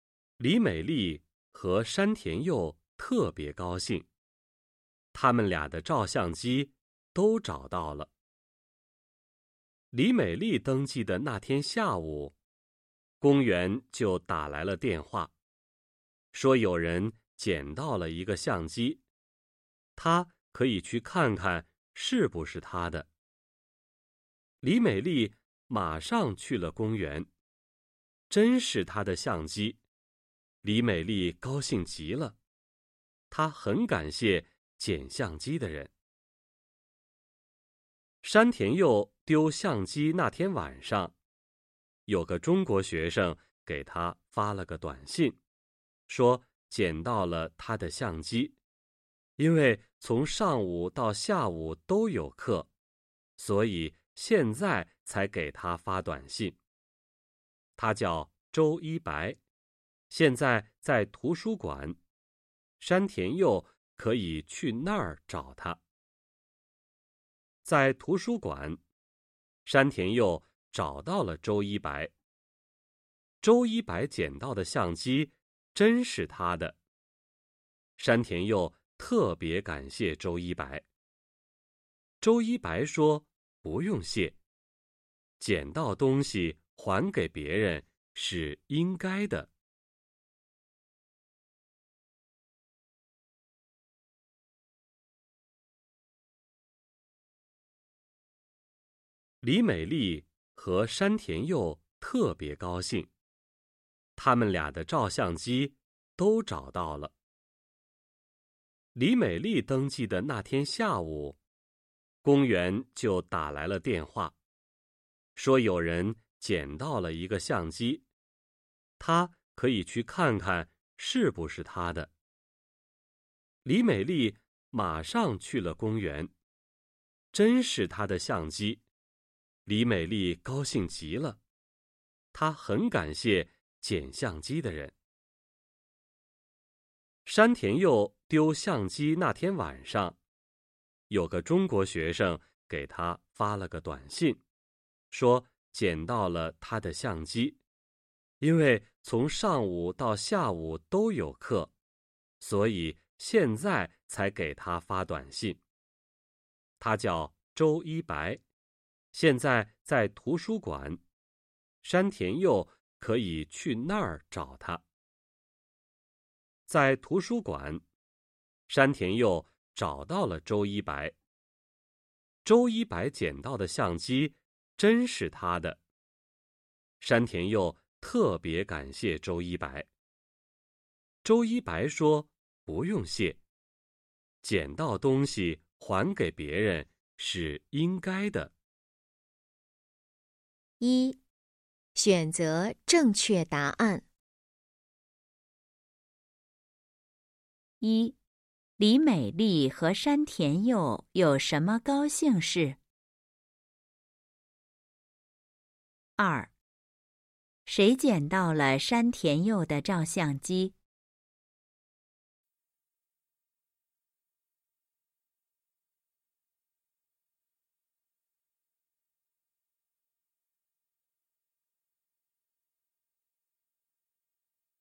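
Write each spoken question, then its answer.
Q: 李美丽和山田佑有什么高兴事?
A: 他们俩的照相机都找到了

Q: 谁捡到了山田佑的照相机?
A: 周一白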